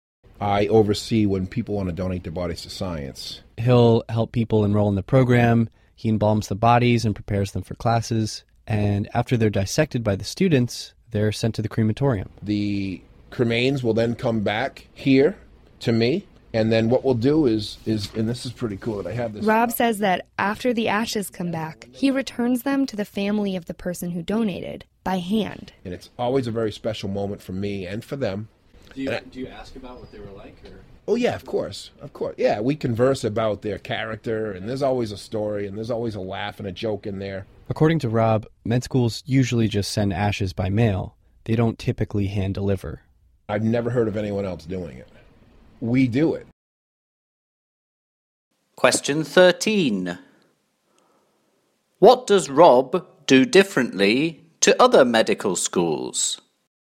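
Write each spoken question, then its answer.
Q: What does Rob do differently to other medical schools?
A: He returns the ashes to the families by hand instead of by mail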